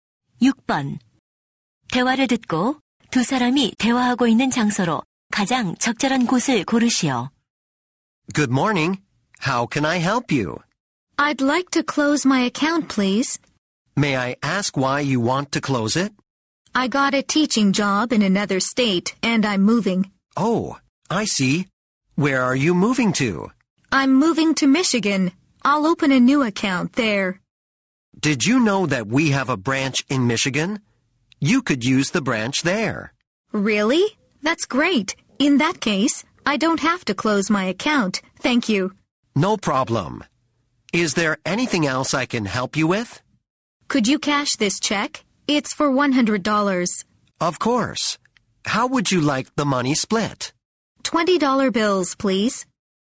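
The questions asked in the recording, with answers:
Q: 대화를 듣고 두 사람이 대화하고 있는 장소로 가장 적절한 곳을 고르시오.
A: 은행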